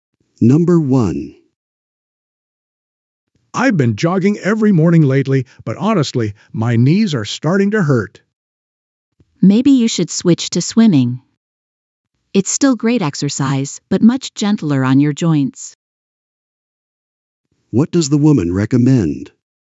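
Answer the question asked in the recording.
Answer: Switching from jogging to swimming, which is gentler on the joints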